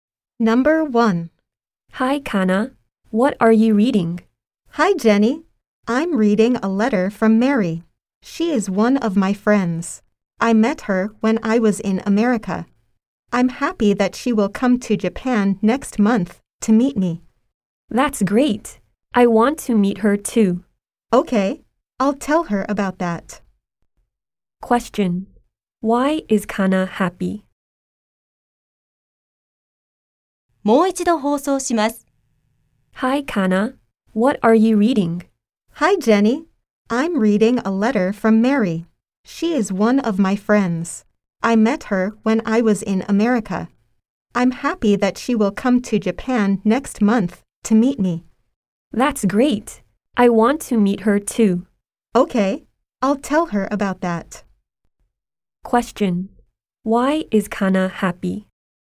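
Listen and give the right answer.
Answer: Because her friend Mary will come to Japan next month to meet her.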